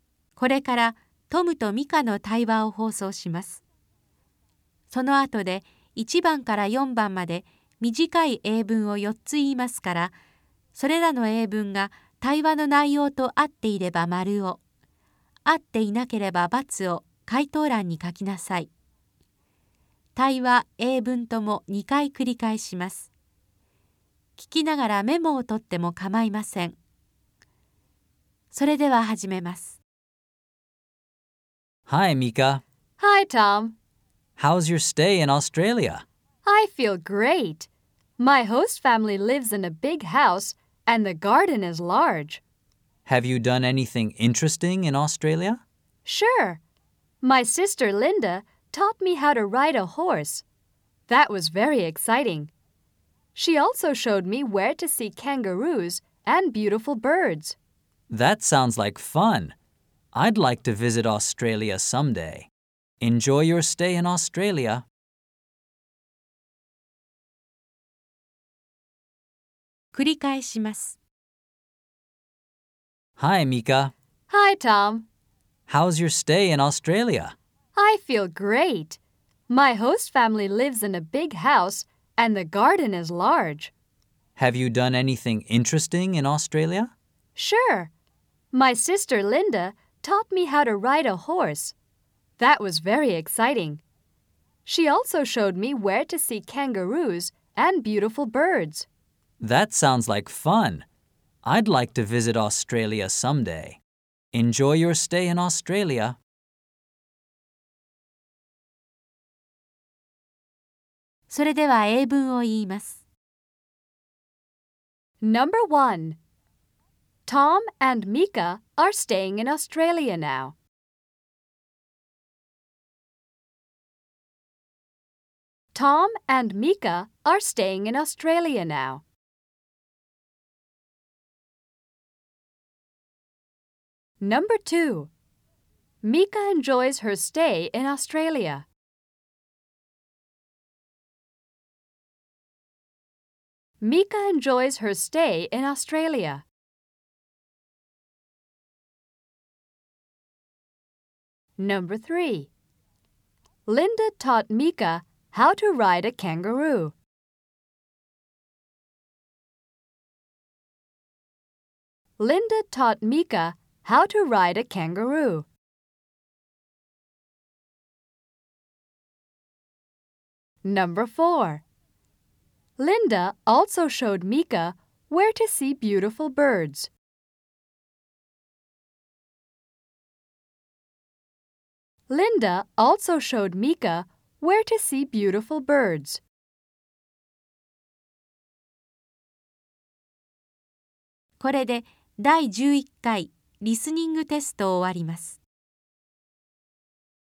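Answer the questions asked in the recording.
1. False (×)
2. True (○)
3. False (×)
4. True (○)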